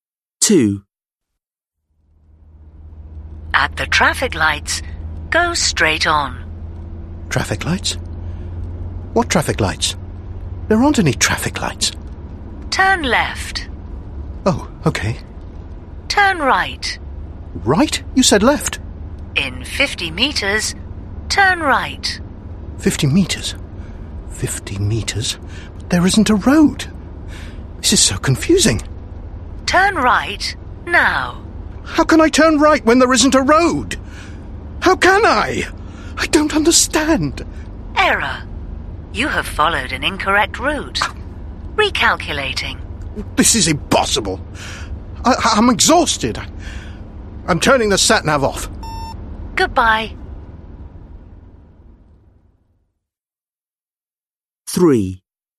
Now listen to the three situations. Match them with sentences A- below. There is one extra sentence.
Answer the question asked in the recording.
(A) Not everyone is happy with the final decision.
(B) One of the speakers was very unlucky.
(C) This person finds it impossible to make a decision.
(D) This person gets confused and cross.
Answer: (D) This person gets confused and cross.

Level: Lớp 10